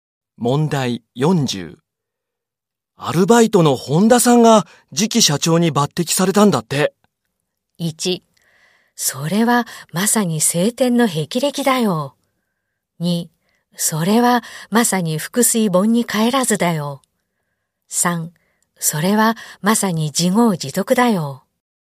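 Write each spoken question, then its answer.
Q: アルバイトの本田さんが次期社長に抜擢されたんだって。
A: 1: それはまさに青天の霹靂だよ。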